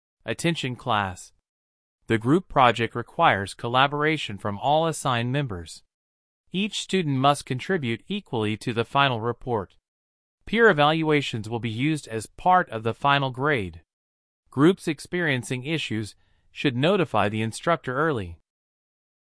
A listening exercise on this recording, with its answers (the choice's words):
Listen to an announcement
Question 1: What is the main topic of the announcement?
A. Final exam grading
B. Group project expectations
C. Instructor office hours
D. Research report formatting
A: Group project expectations

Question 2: How will individual effort be assessed?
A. By attendance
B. Through quizzes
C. Using peer evaluations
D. Through presentations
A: Using peer evaluations

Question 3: What is implied about reporting group problems early?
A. Problems will be ignored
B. The instructor can help resolve issues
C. Grades will be reduced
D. Groups will be reassigned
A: The instructor can help resolve issues

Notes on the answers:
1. The announcement focuses on group work responsibilities.
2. The announcement mentions peer evaluations as part of grading.
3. Notifying early implies the instructor may assist or intervene.